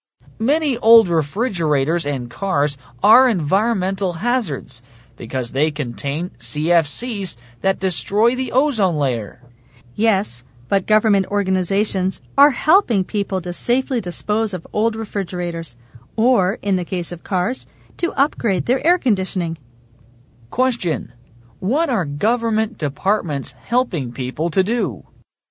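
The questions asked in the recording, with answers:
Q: What are government departments helping people to do?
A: Safely dispose of old refrigerators or upgrade car air conditioning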